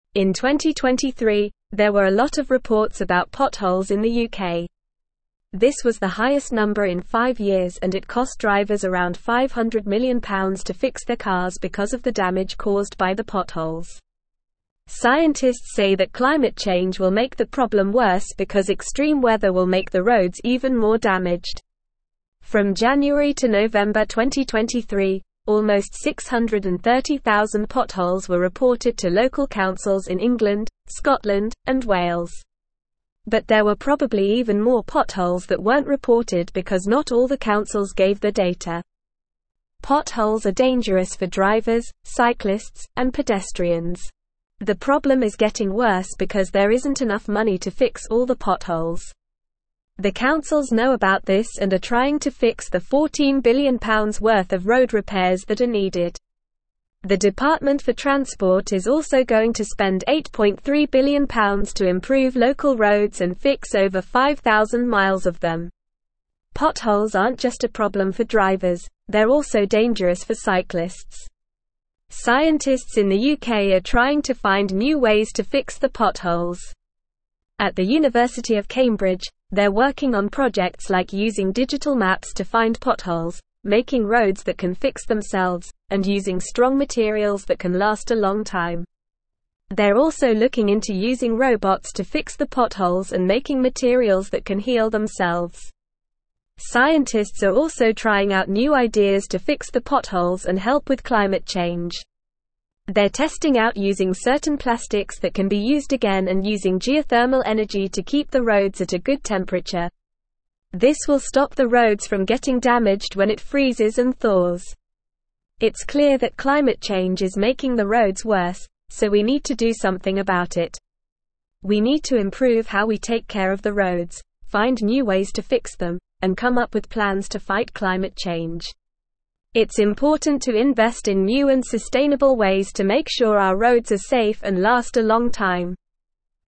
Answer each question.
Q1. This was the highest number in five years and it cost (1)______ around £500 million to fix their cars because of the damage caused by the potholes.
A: drivers

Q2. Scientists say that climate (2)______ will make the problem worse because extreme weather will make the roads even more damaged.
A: change

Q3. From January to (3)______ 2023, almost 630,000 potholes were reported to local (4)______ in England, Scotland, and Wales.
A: November

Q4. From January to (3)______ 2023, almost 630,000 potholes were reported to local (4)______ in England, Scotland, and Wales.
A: councils

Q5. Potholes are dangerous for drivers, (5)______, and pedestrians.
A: cyclists

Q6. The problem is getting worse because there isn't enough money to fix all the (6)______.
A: potholes

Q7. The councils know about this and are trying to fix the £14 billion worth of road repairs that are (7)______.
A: needed

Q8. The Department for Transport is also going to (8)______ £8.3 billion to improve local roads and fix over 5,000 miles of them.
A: spend

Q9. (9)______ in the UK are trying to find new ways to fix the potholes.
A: Scientists

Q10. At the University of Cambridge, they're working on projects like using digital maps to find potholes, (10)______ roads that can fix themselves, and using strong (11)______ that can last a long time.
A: making

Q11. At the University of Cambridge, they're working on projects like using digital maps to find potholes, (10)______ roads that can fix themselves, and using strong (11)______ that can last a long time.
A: materials

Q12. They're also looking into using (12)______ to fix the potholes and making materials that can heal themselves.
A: robots

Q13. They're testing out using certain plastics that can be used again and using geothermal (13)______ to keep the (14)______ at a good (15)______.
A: energy

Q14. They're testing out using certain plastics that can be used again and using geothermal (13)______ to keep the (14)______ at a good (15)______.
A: roads

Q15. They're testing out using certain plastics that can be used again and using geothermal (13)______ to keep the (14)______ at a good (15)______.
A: temperature

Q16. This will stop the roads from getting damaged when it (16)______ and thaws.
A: freezes

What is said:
In 2023, there were a lot of reports about potholes in the UK. This was the highest number in five years and it cost drivers around £500 million to fix their cars because of the damage caused by the potholes. Scientists say that climate change will make the problem worse because extreme weather will make the roads even more damaged. From January to November 2023, almost 630,000 potholes were reported to local councils in England, Scotland, and Wales. But there were probably even more potholes that weren't reported because not all the councils gave their data.
Potholes are dangerous for drivers, cyclists, and pedestrians. The problem is getting worse because there isn't enough money to fix all the potholes. The councils know about this and are trying to fix the £14 billion worth of road repairs that are needed. The Department for Transport is also going to spend £8.3 billion to improve local roads and fix over 5,000 miles of them.
Potholes aren't just a problem for drivers, they're also dangerous for cyclists. Scientists in the UK are trying to find new ways to fix the potholes. At the University of Cambridge, they're working on projects like using digital maps to find potholes, making roads that can fix themselves, and using strong materials that can last a long time. They're also looking into using robots to fix the potholes and making materials that can heal themselves.
Scientists are also trying out new ideas to fix the potholes and help with climate change. They're testing out using certain plastics that can be used again and using geothermal energy to keep the roads at a good temperature. This will stop the roads from getting damaged when it freezes and thaws.
It's clear that climate change is making the roads worse, so we need to do something about it. We need to improve how we take care of the roads, find new ways to fix them, and come up with plans to fight climate change. It's important to invest in new and sustainable ways to make sure our roads are safe and last a long time.

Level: Level 3